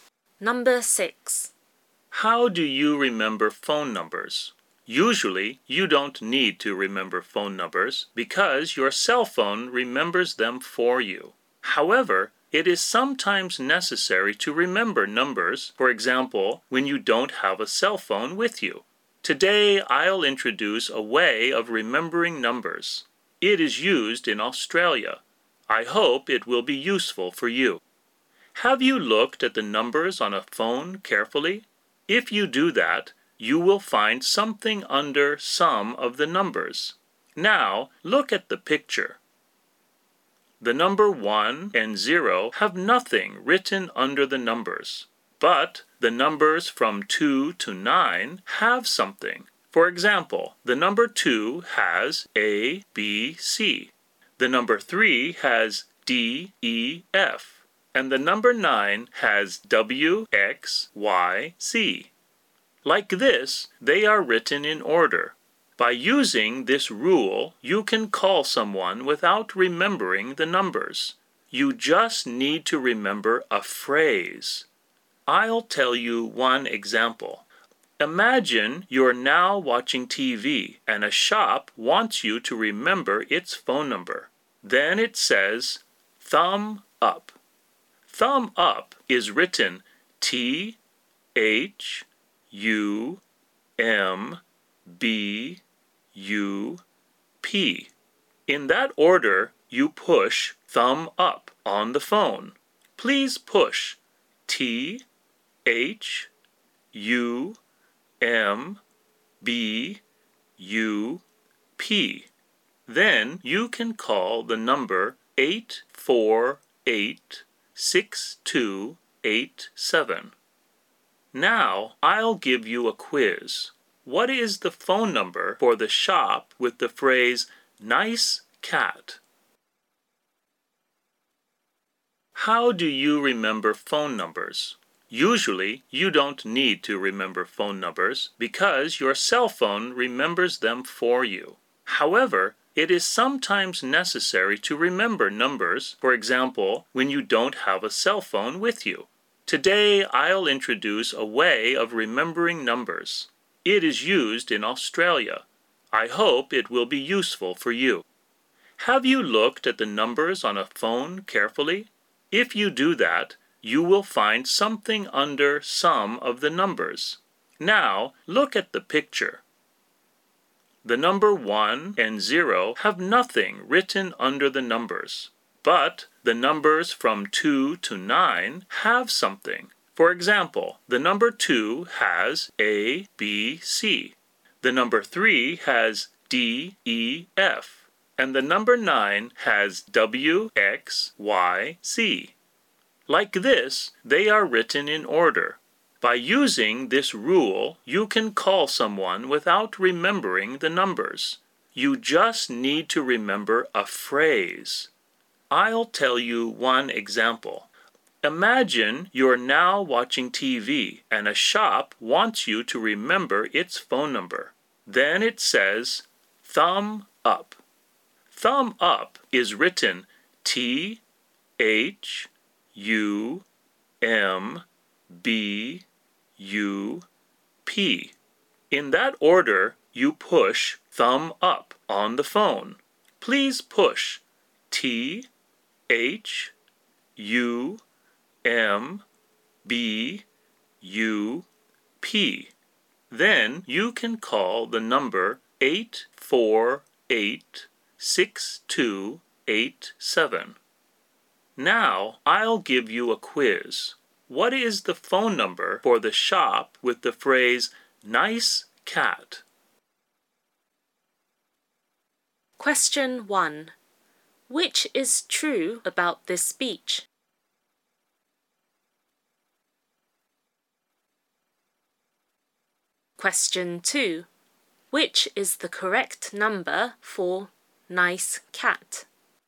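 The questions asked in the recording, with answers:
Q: Which is the correct number for nice cat?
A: 642-3228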